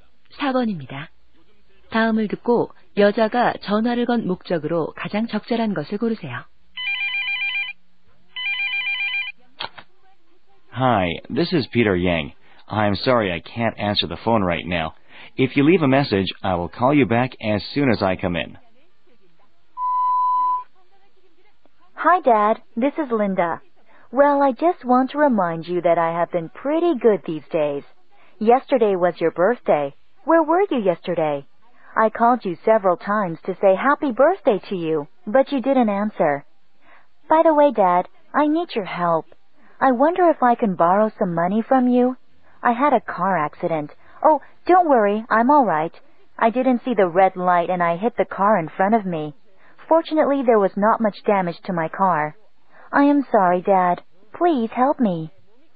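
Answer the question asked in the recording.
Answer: 아빠에게 돈을 빌리려고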